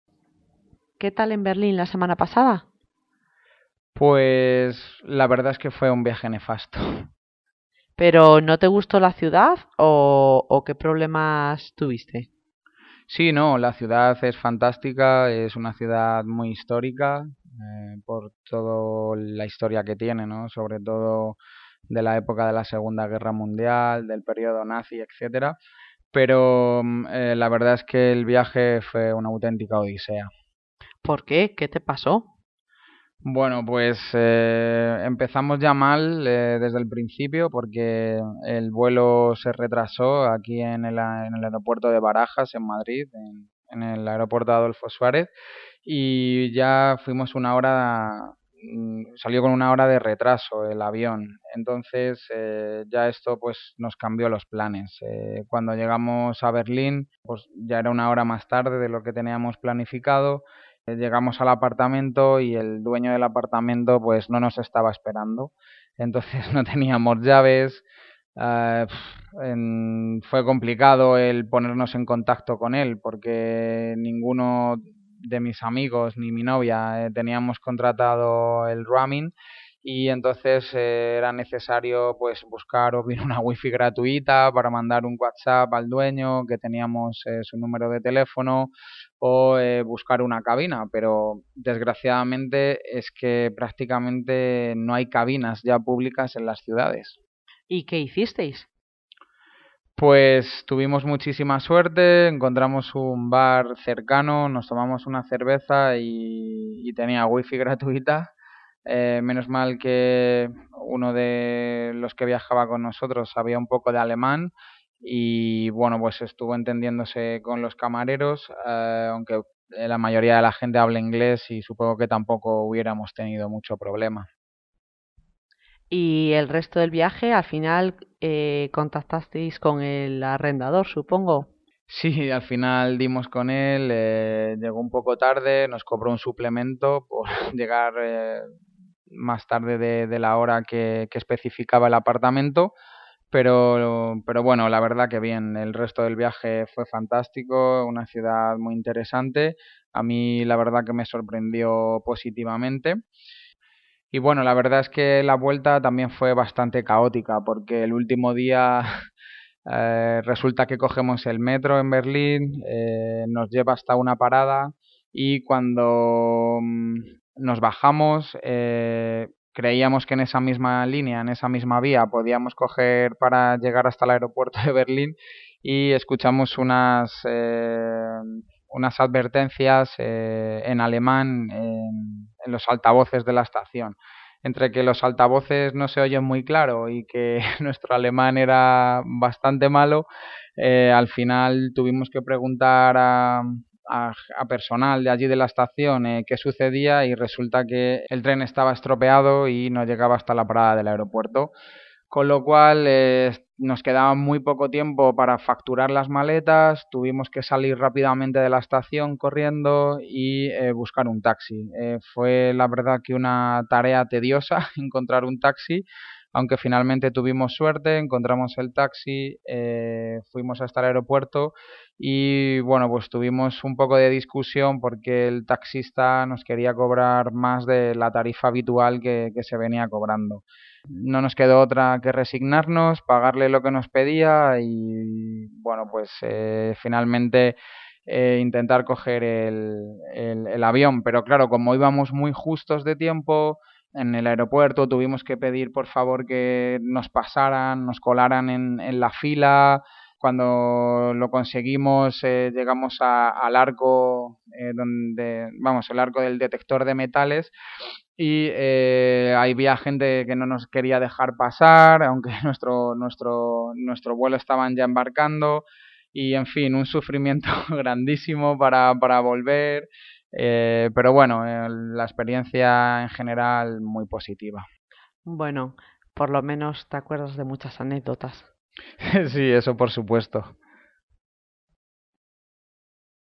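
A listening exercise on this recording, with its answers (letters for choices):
Responde las preguntas del audio. Señala solo las afirmaciones que sean completamente correctas con el audio.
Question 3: ¿Por qué la vuelta fue caótica?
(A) Se confundieron de metro para ir al aeropuerto.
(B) El metro estaba estropeado y no llegaron a la parada que querían.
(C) El personal del metro les indicó mal y fueron en dirección contraria.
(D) Hicieron avisos en alemán pero no pudieron entenderlos y perdieron mucho tiempo.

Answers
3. B

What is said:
Isabel: ¿Qué tal en Berlín la semana pasada?
Moisés: Pues la verdad es que fue un viaje nefasto.
Isabel: ¿Pero no te gustó la ciudad o qué problemas tuviste?
Moisés: Sí, no, la ciudad es fantástica. Es una ciudad muy histórica por toda la historia que tiene, sobre todo, de la Segunda Guerra Mundial, del periodo Nazi, etc. Pero la verdad es que el viaje fue una auténtica odisea.
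Isabel: ¿Por qué? ¿qué te pasó?
Moisés: Bueno, pues, empezamos ya mal desde el principio. Porque el vuelo se retrasó aquí en el aeropuerto de Barajas, en Madrid, en el aeropuerto Adolfo Suárez, y ya fuimos una hora... salió con una hora de retraso, el avión. Entonces ya esto, pues nos cambió los planes. Cuando llegamos a Berlín, pues ya era una hora más tarde de lo planificado. Llegamos al apartamento y el dueño del apartamento no nos estaba esperando. Entonces no teníamos llaves... puf, fue complicado el ponernos en contacto con él. Porque ninguno de mis amigos, ni mi novia, teníamos contratado el roaming y entonces era necesario pues, o bien, buscar una wifi gratuita para mandar un WhastApp al dueño, que teníamos su teléfono, o buscar una cabina. Pero desgraciadamente, es que prácticamente no hay cabinas ya públicas en la ciudades.
Isabel: ¿Y qué hicisteis?
Moisés: Pues tuvimos muchísima suerte, encontramos un bar cercano, nos tomamos una cerveza y tenía WiFi gratuita. 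Menos mal que uno de los que viajaba con nosotros sabía un poco de alemán, y bueno pues, estuvo entendiéndose con los camareros aunque la mayoría de la gente habla inglés y supongo que tampoco hubiéramos tenido mucho problema.
Isabel: Y el resto del viaje ¿al final contactasteis con el arrendador, supongo?
Moisés: Sí, al final dimos con él. Llegó un poco tarde, nos cobró un suplemento por llegar más tarde de la hora que especificaba el apartamento. Pero bueno, la verdad que bien. El resto de viaje fantástico, una ciudad muy interesante. A mí la verdad que me sorprendió positivamente.
Y bueno, la verdad es que la vuelta también fue bastante caótica. Porque el último día, resulta que cogemos el metro en Berlín, nos lleva hasta una parada y cuando nos bajamos, creíamos que en esa misma línea, en esa misma vía, podíamos coger para llegar hasta el aeropuerto de Berlín, y escuchamos unas advertencias en alemán, en los altavoces de la estación. 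Entre que los altavoces no se oyen muy claro y que nuestro alemán era bastante malo... al final tuvimos que preguntar a personal de allí de la estación qué sucedía y resulta que el tren estaba estropeado y no llegaba hasta la parada del aeropuerto.
Con lo cual, nos quedaba muy poco tiempo para facturar las maletas, tuvimos que salir rápidamente de la estación, corriendo, y buscar un taxi. Fue la verdad que una tarea tediosa, encontrar un taxi, aunque finalmente tuvimos suerte, encontramos el taxi, fuimos hasta el aeropuerto, y bueno, pues tuvimos un poco de discusión porque el taxista nos quería cobrar más de la tarifa habitual que se venía cobrando. No nos quedó otra que resignarnos, pagarle lo que nos pedía y bueno, pues, finalmente, intentar coger el avión. Pero claro, como íbamos muy justos de tiempo, en el aeropuerto tuvimos que pedir por favor que nos pasaran, nos colaran, en la fila. 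Cuando lo conseguimos llegamos al arco donde, vamos el arco del detector de metales, y había gente que no nos quería dejar pasar... aunque nuestro vuelo estaba ya embarcando. Y en fin, un sufrimiento grandísimo para volver. Pero bueno, la experiencia en general muy positiva.
Isabel: Bueno, por lo menos te acuerdas de muchas anécdotas.
Moisés: Sí, eso por supuesto.

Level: Nivel sugerido: B2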